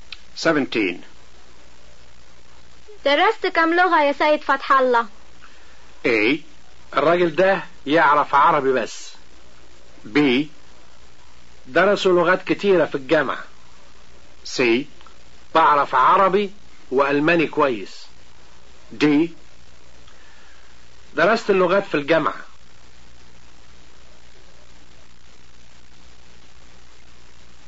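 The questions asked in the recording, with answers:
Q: درست كم لغة يا سيد فتح الله؟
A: C: بعرف عربي وألماني كويس.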